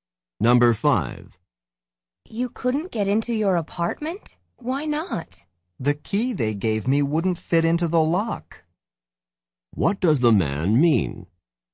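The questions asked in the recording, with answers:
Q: What does the man mean?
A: He was given the wrong key; it didn't fit the lock.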